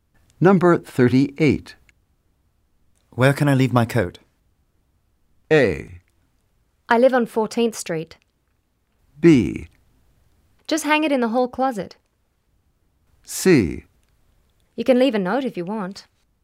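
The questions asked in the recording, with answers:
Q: Where can I leave my coat?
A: B: Just hang it in the hall closet.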